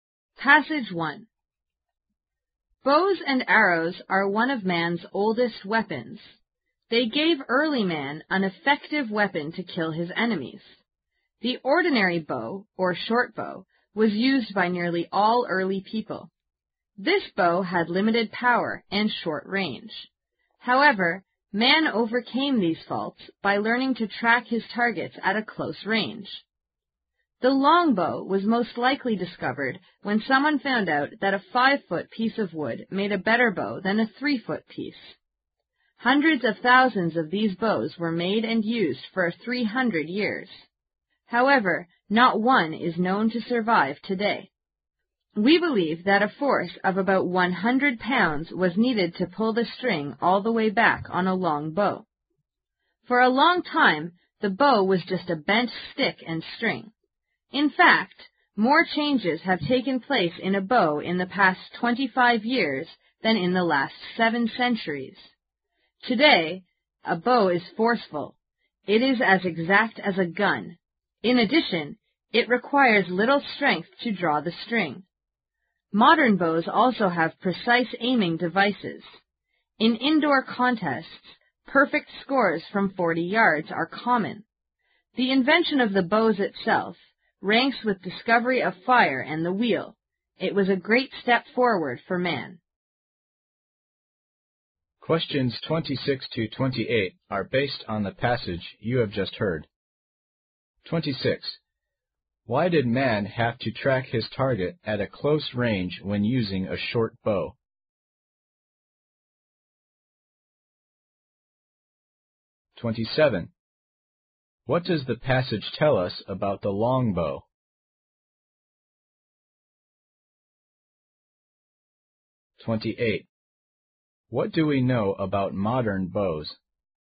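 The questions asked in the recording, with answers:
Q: Why did man have to track his target at a close range when using a short bow?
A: The short bow had limited power and short range

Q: What do we know about modern bows?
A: They are as exact as a gun and need little strength to draw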